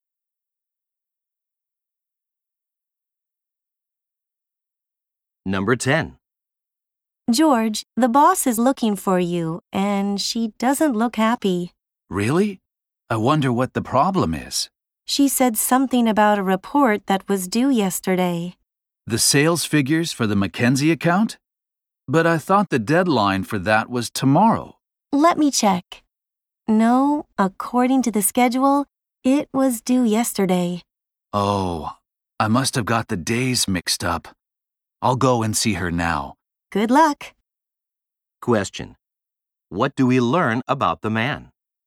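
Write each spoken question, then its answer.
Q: What do we learn about the man?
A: He missed the report deadline by mixing up the days.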